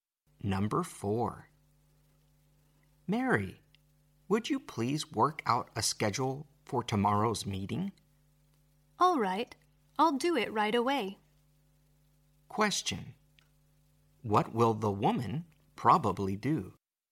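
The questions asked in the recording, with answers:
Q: What will the woman probably do?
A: Work out a schedule for tomorrow's meeting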